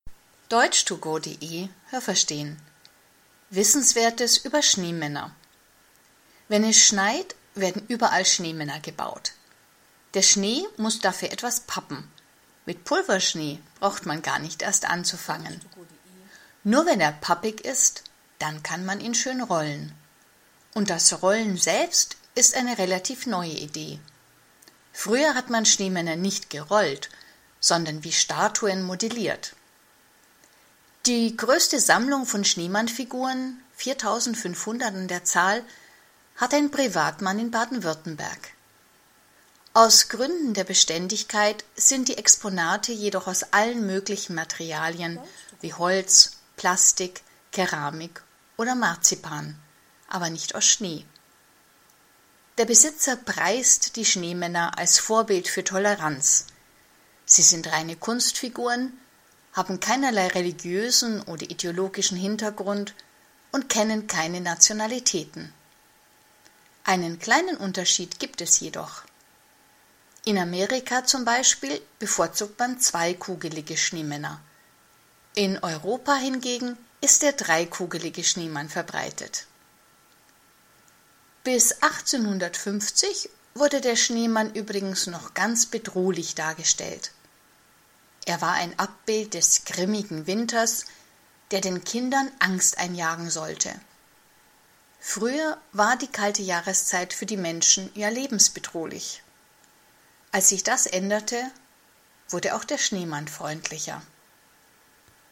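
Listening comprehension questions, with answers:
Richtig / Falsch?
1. Man rollt einen Schneemann am besten, indem man mit Pulverschnee anfängt und dann mit pappigem Schnee weitermacht.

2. Früher hat man Schneemänner wie Plastiken geformt.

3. Von den 4.500 Schneemannfiguren bestehen nur die wenigsten aus Schnee.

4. Der Besitzer der Sammlung bezeichnet seine Figuren als künstlerisch sehr anspruchsvoll.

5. Der Besitzer der Ausstellung sagt, Schneemänner seien unpolitisch und hätten keinen religiösen Hintergrund.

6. In Amerika baut man gerne Schneemänner aus 2 Teilen, in europäischen Ländern bevorzugt man Schneemänner aus 3 Teilen.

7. Bis zur Mitte des 19. Jahrhunderts sollte der Schneemann mit seinem drolligen Gesicht die Kinder vor dem lebensbedrohlichen Winter beschützen.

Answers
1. Falsch
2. Richtig
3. Falsch
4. Falsch
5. Richtig
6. Richtig
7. Falsch

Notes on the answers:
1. Pulverschnee funktioniert nicht. 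Der Schnee muss beim Rollen pappig sein.
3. Kein Modell ist aus Schnee (weil Schnee schmelzen würde).
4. Er sagt, das sind „Kunstfiguren", das heißt Gestalten der Fantasie ohne jegliche Entsprechung in der Wirklichkeit.
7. Schneemänner hatten damals bedrohliche Gesichter und sollten die Kinder vor dem lebensbedrohlichen Winter warnen.

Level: Hörtexte C (schwer)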